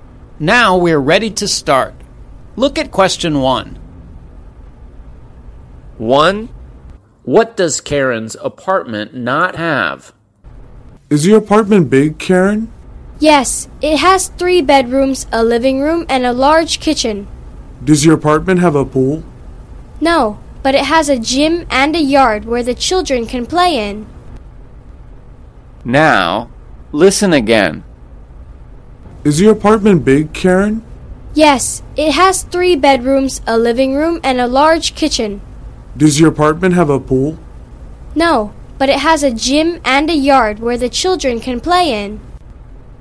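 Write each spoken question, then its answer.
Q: What does Karen's apartment not have?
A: a pool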